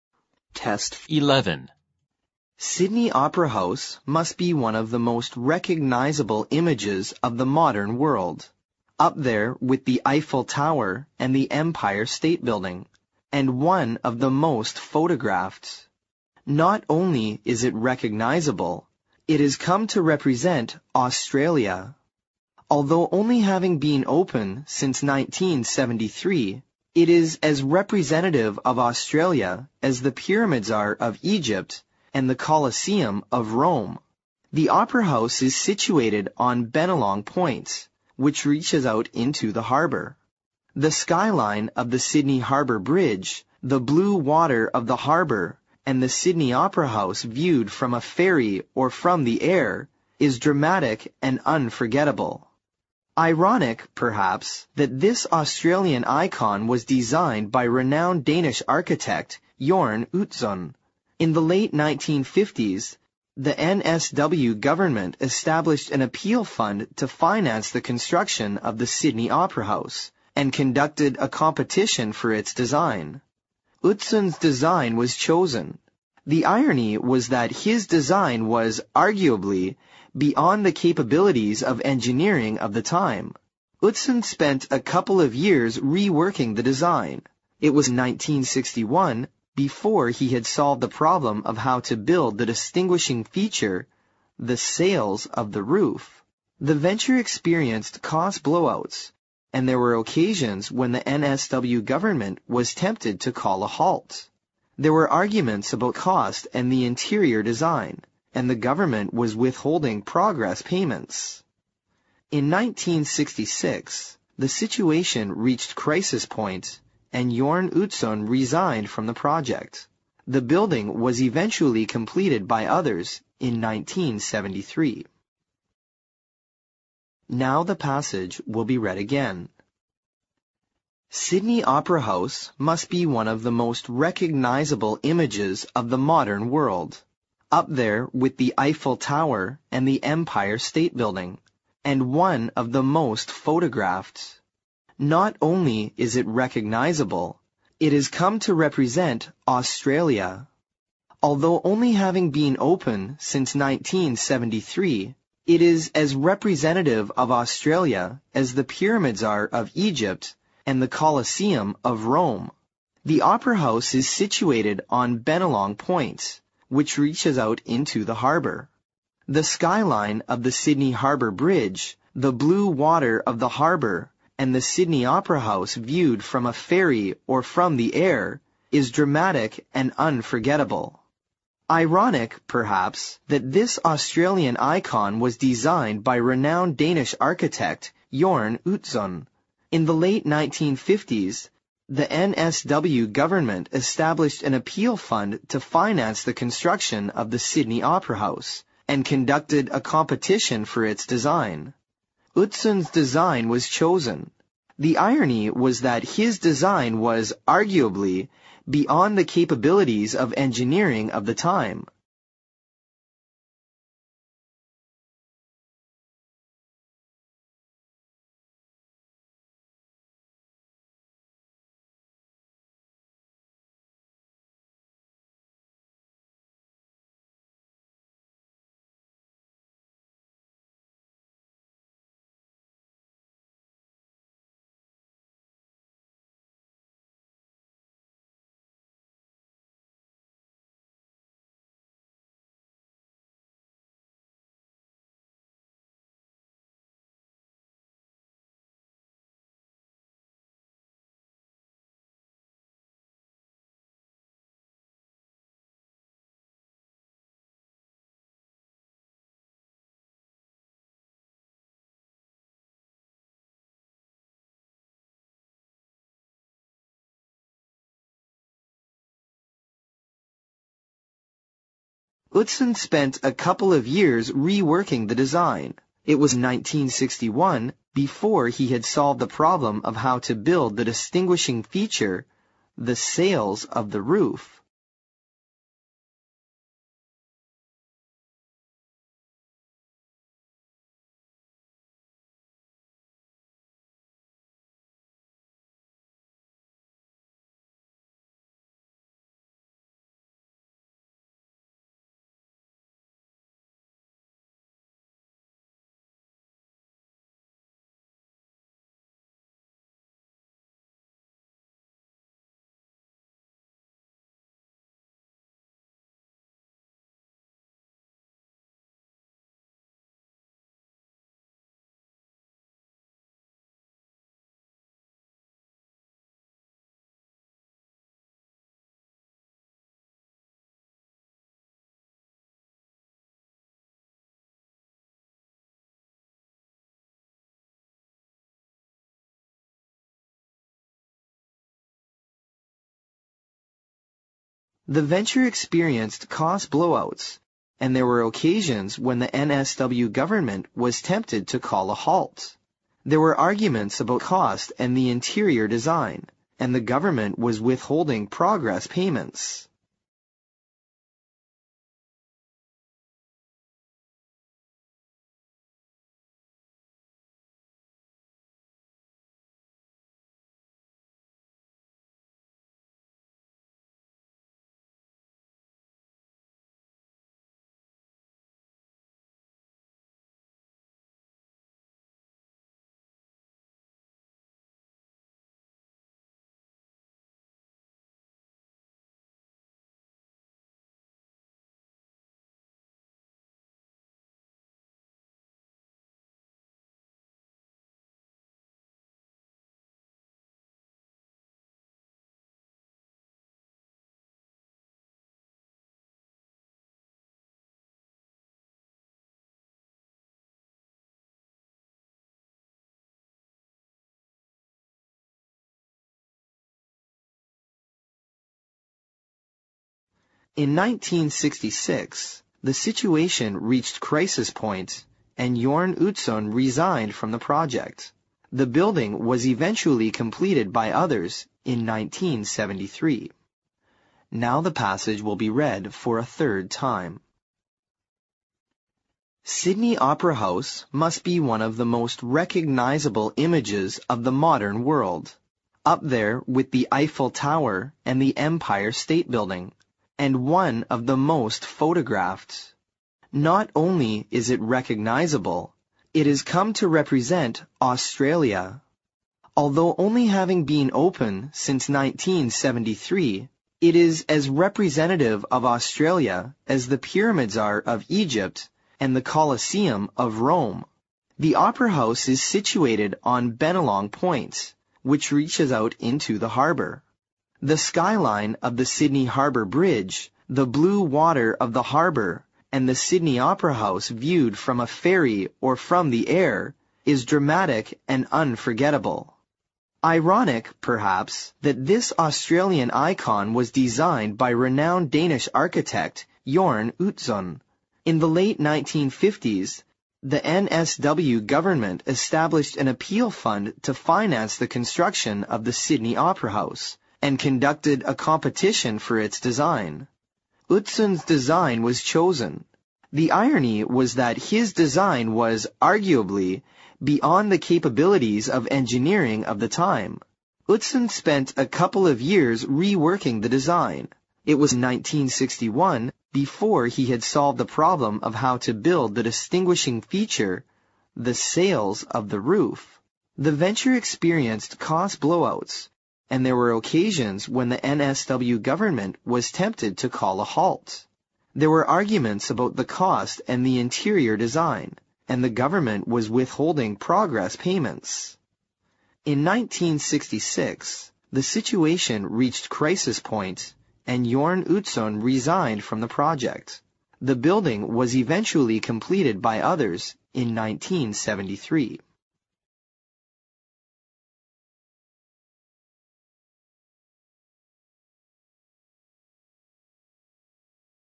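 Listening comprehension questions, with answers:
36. Although only having been open since 1973, it is as (36) ______ of Australia as the pyramids are of Egypt and the Colosseum of Rome.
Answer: representative

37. The Opera House is (37) ______ on Bennelong Point, which reaches out into the harbour.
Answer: situated

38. The (38) ______ of the Sydney Harbour Bridge, the blue water of the harbour and the Sydney Opera House, (39) ______ from a ferry or from the air, is (40) ______ and unforgettable.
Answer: skyline

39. The (38) ______ of the Sydney Harbour Bridge, the blue water of the harbour and the Sydney Opera House, (39) ______ from a ferry or from the air, is (40) ______ and unforgettable.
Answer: viewed

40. The (38) ______ of the Sydney Harbour Bridge, the blue water of the harbour and the Sydney Opera House, (39) ______ from a ferry or from the air, is (40) ______ and unforgettable.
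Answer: dramatic

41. Ironic, perhaps, that this Australian icon was designed by (41) ______ Danish architect-Jorn Utzon.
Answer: renowned

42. In the late 1950s the NSW Government established an appeal fund to (42) ______ the construction of the Sydney Opera House, and (43) ______ a competition for its design.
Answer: finance

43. In the late 1950s the NSW Government established an appeal fund to (42) ______ the construction of the Sydney Opera House, and (43) ______ a competition for its design.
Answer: conducted

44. The irony was that (44) _____________________________________________________________ .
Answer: his design was, arguably, beyond the capabilities of engineering of the time

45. It was 1961 before (45) __________________________________________________________________________________ .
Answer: he had solved the problem of how to build the distinguishing feature, the sails of the roof

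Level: 六级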